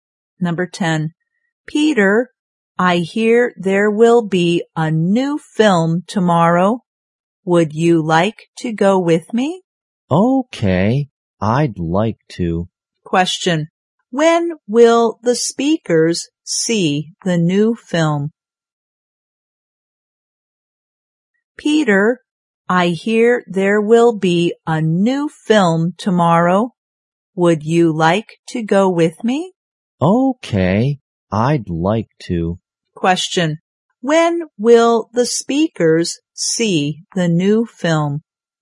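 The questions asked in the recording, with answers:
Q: when will the speakers see the new film?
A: Tomorrow.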